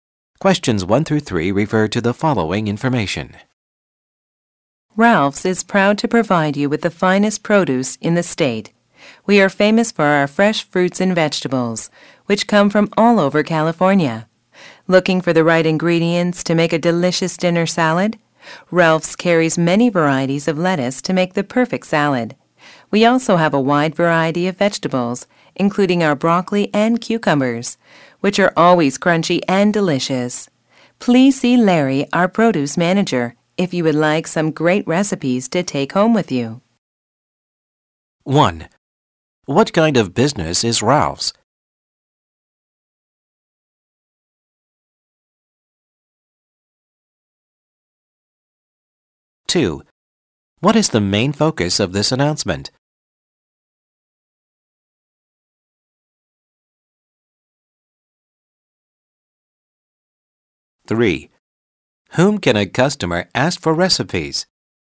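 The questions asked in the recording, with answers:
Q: What kind of business is Ralph's?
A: A grocery store selling produce

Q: Whom can a customer ask for recipes?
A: Larry, the produce manager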